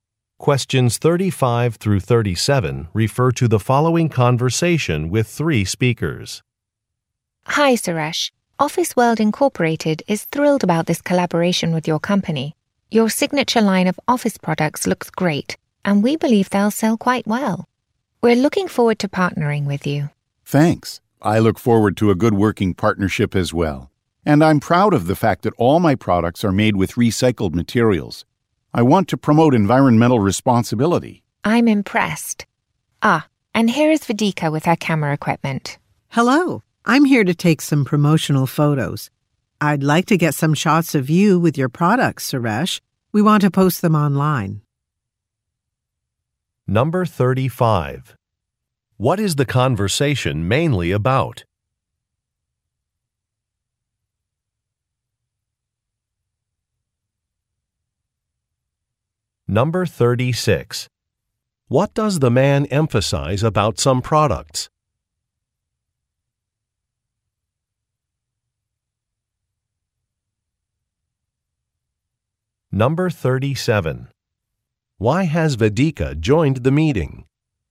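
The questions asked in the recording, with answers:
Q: What is the conversation mainly about?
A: A new business partnership

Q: What does the man emphasize about some products?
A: They are made with recycled materials

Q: Why has Vidika joined the meeting?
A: To take promotional photos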